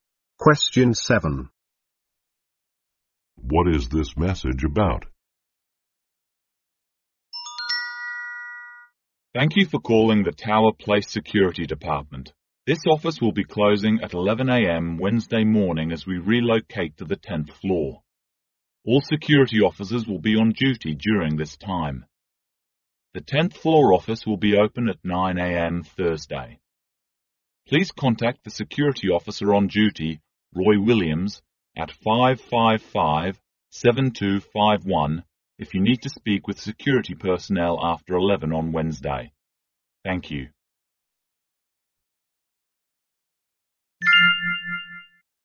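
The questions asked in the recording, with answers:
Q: What is this message about?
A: The security office relocating to the 10th floor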